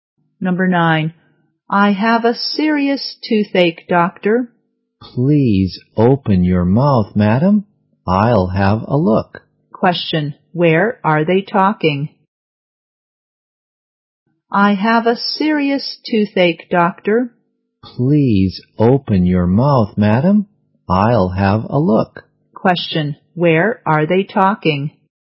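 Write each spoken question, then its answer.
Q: Where are they talking?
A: In a hospital (dentist's)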